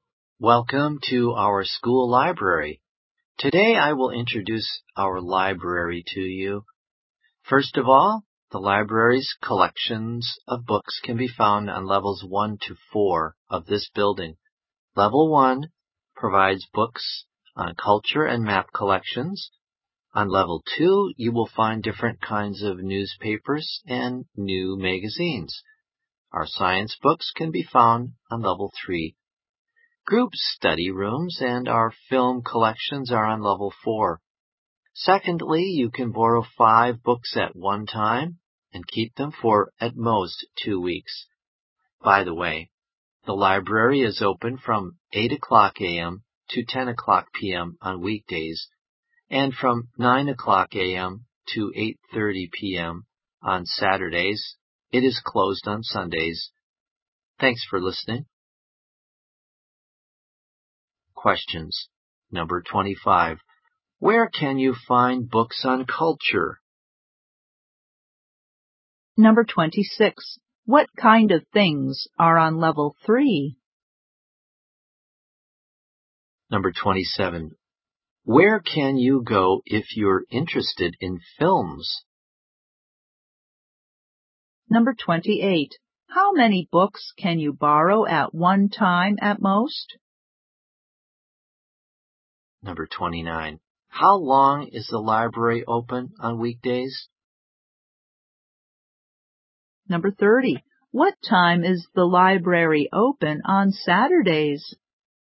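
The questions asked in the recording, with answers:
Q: Where can you find books on culture?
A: On level 1

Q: What kind of things are on level 3?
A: Science books

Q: Where can you go if you're interested in films?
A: Level 4

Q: How long is the library open on weekdays?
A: 14 hours

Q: What time is the library open on Saturdays?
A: From 9 a.m. to 8:30 p.m.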